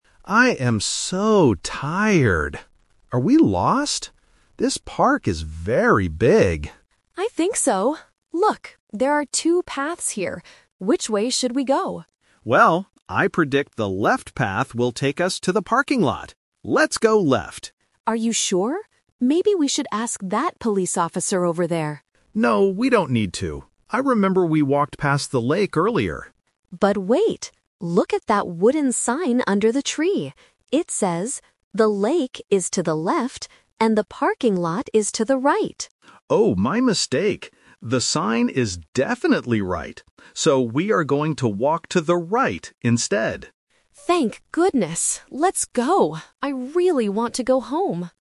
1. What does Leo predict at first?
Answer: The left path goes to the parking lot.

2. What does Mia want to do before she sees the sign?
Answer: Ask a police officer for help.

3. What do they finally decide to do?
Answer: Take the right path.

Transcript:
Leo: I am so tired. Are we lost? This park is very big.
Mia: I think so. Look, there are two paths here. Which way should we go?
Leo: Well, I predict the left path will take us to the parking lot. Let's go left.
Mia: Are you sure? Maybe we should ask that police officer over there.
Leo: No, we don't need to. I remember we walked past the lake earlier.
Mia: But wait! Look at that wooden sign under the tree. It says the lake is to the left, and the parking lot is to the right!
Leo: Oh, my mistake. The sign is definitely right. So we are going to walk to the right instead.
Mia: Thank goodness. Let's go. I really want to go home.